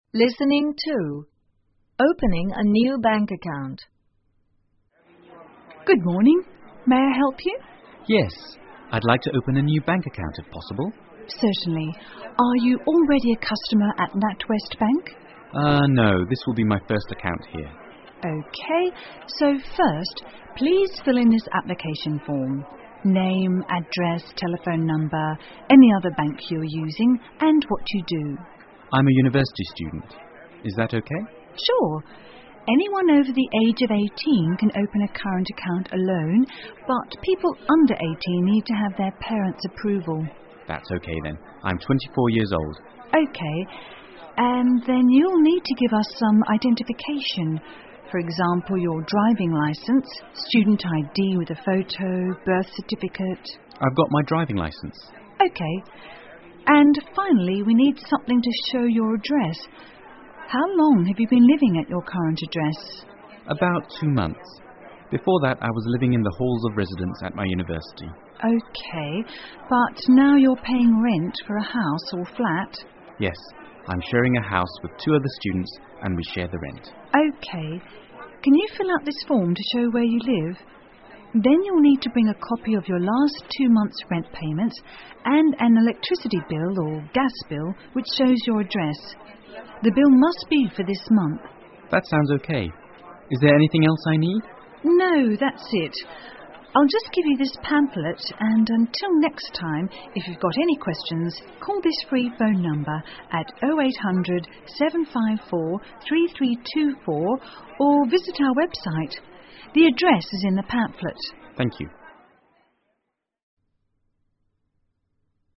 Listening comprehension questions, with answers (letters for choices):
请根据对话内容,判断下面句子是否正确,如果符合对话内容,请在T做记号,如果不符合,请在F做记号。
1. It's the man's first account at the bank.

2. The man has got a job as driver.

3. People must be 18 or over to open a bank account on their own.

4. The man has got his birth certificate with him.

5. The man lives alone.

请根据对话内容,选出一个正确的答案。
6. For a new bank account you need some identification. Which of the following doesn't the clerk mention?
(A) Driving licence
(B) Birth certificate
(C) Student ID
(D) Passport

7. Which of the following does the man have?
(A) Driving licence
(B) Birth certificate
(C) Student id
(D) Passport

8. Where does the customer live?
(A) In a flat alone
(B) In halls of residence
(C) In a house with his family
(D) In a house with other students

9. What will the customer bring with him next time?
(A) Driving licence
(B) A bill showing his address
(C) Passport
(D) Telephone bills for two months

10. What is the telephone number of then bank?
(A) 080-754-3324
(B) 0800-745-3324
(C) 0800-854-3324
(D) 0800-754-3324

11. Who are the speakers?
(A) Two customers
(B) A bank manager and a customer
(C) A bank clerk and a customer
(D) Two bank clerks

下面是对话部分的内容, 请再听一次对话,在空格内填入遗漏的部分。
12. For example your driving licence, student ID with_________, birth certificate....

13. C: About ______ months, Before that, I was living in the halls of residence at my university.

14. But now you're paying ______________for a house or flat?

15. Then you will need to bring a copy of your last ________rent payments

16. and an electricity bill or gas bill, which shows your ______.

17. Is there anything else I___________?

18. Call this free phone number at 0800-754-3324 or visit our _______________.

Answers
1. T
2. F
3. T
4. F
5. F
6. D
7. A
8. D
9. B
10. D
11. C
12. a photo
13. two
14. rent
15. two month's
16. address
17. need
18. website

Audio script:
Bank Clerk:Good morning,may I help you?
Customer:Yes,I'd like to open a new bank account if possible?
BC:Certainly.Are you already a customer at NatWest Bank?
C:Urm.No,this will be my first account here.
BC:OK.So first,please fill in this application form.Name,address,telephone number,and other
banks you are using,and what you do.
C:I'm a university student.Is that OK?
BC:Sure.Anyone over the age of 18 can open a current account alone but people under 18 need to have their parents' approval.
C:That's OK then.I'm 24 years old.
BC:OK.And then you will need to give us some identification.For example your driving licence,student ID with a photo,birth certificate...
C:I've got my driving licence.
BC:OK.And finally we need something to show you address.How long have you been living at your current address?
C:About two months.Before that,I was living in the halls of residence at my university.
BC:OK.But now you're paying rent for a house or flat?
C:Yes.I'm sharing a house with two other students and we share the rent.
BC:OK.Can you fill out this form to show where you live?Then you will need to bring a copy of your last two months' rent payments,and an electricity bill or gas bill,which shows your address.The bill must be for this month.
C:That sounds OK.Is there anything else I need?
BC:No,that's it.I'll just give you this pamphlet and until next time,if you've got any questions,call this free phone number at 0800-754-3324 or visit our website.The address is in the pamphlet.
C:Thank you.